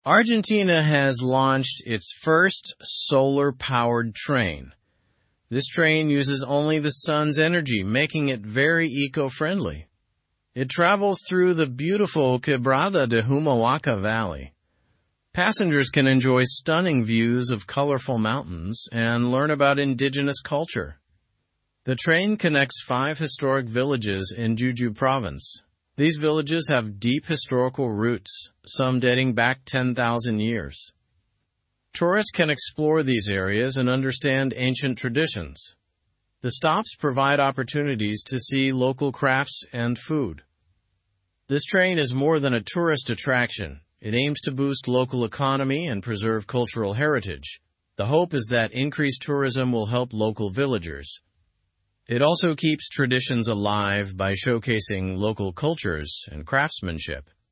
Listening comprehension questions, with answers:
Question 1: What powers the train in Argentina?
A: Solar energy powers the train.

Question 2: Where does the train travel?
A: It travels through Quebrada de Humahuaca valley.

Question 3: How many historic villages does the train connect?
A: The train connects five historic villages.

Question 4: What can tourists learn from the train ride?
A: Tourists can learn about indigenous culture.

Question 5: What opportunities do the stops offer?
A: The stops offer opportunities to see local crafts and food.

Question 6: What is one goal of this solar-powered train?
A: The goal is to boost the local economy and preserve culture.

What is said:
Argentina has launched its first solar-powered train. This train uses only the sun's energy, making it very eco-friendly. It travels through the beautiful Quebrada de Humahuaca valley. Passengers can enjoy stunning views of colorful mountains and learn about indigenous culture.
The train connects five historic villages in Jujuy province. These villages have deep historical roots, some dating back 10,000 years. Tourists can explore these areas and understand ancient traditions. The stops provide opportunities to see local crafts and food.
This train is more than a tourist attraction. It aims to boost local economy and preserve cultural heritage. The hope is that increased tourism will help local villagers. It also keeps traditions alive by showcasing local cultures and craftsmanship.

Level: Level 2